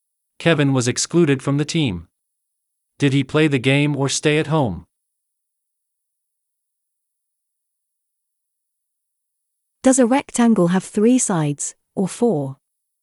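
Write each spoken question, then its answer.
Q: Did he play the game or stay at home?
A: stayed at home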